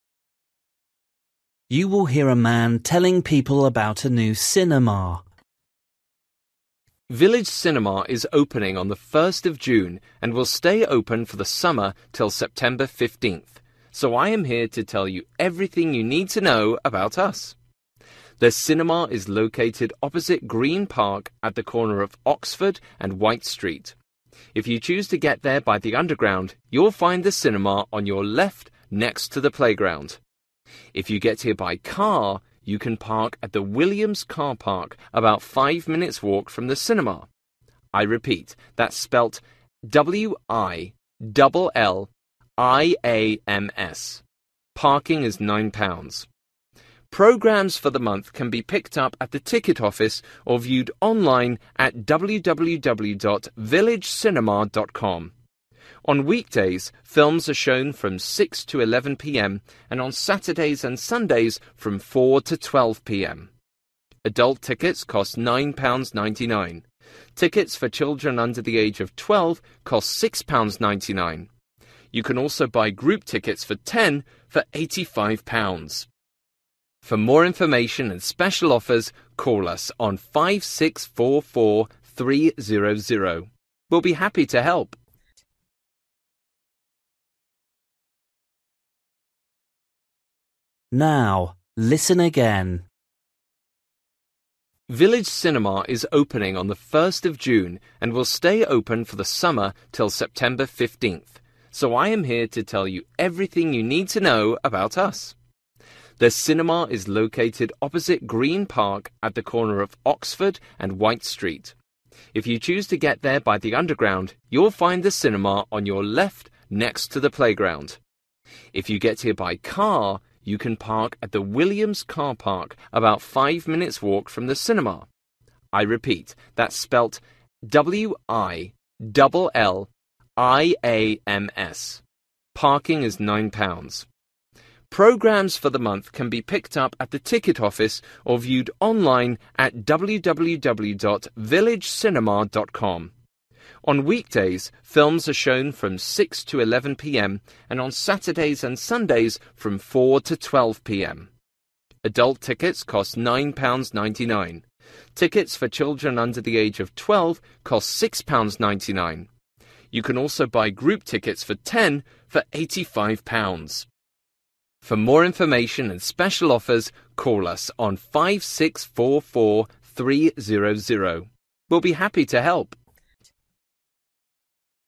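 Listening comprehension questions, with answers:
For each question, write the correct answer in the gap. Write one word or a number or a date or a time.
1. Where: next to the (1)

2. Parking available at: (2) car park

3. Last movie at weekends: at (3)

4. Children's tickets: (4) £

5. Phone number: (5)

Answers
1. playground
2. Williams
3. 12pm
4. 6.99
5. 5644 300

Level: Luyện nghe trình độ A2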